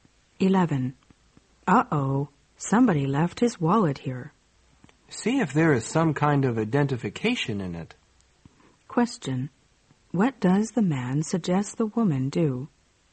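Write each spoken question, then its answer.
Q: What does the man suggest the woman do?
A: Look for identification in the wallet.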